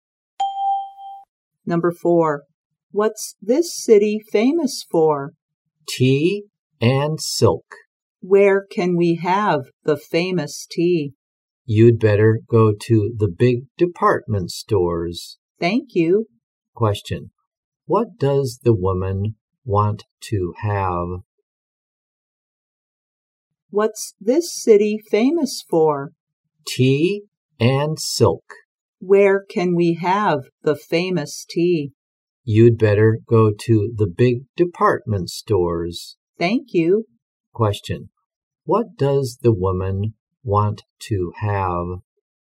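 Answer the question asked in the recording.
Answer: The famous tea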